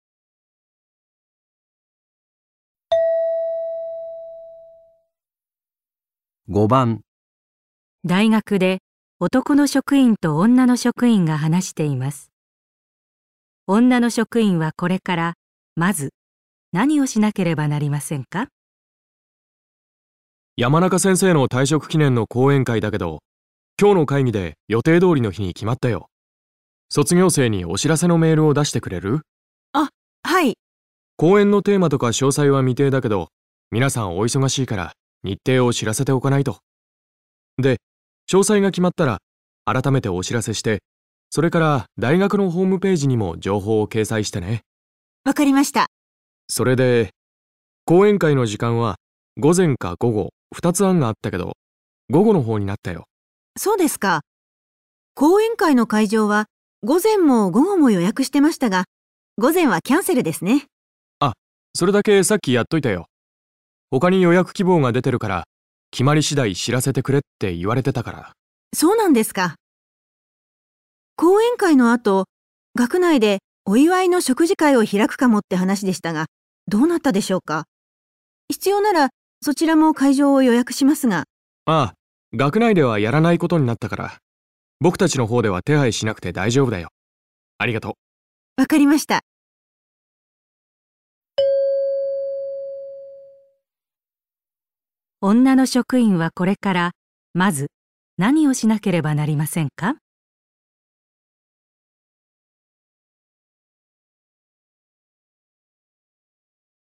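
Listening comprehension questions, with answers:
女の職員はこれからまず何をしなければなりませんか?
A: 卒業生に講演会についてのメールを送る

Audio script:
で、詳細が決まったら改めてお知らせして、それから大学のホームページにも情報を掲載してね。
女の職員:分かりました。
男の職員:それで、講演会の時間は午前か午後、二つ案があったけど、午後の方になったよ。
女の職員:そうですか。講演会の会場は午前も午後も予約してましたが、午前はキャンセルですね。
男の職員:あっ、それだけさっきやっといたよ。他に予約希望が出てるから決まり次第知らせてくれって言われてたから。
女の職員:そうなんですか。講演会の後、学内でお祝いの食事会を開くかもって話でしたが、どうなったでしょうか。必要ならそちらも会場を予約しますが。
男の職員:あぁ、学内ではやらないことになったから、僕たちの方では手配しなくて大丈夫だよ。ありがとう。
問題:女の職員はこれからまず何をしなければなりませんか?

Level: N1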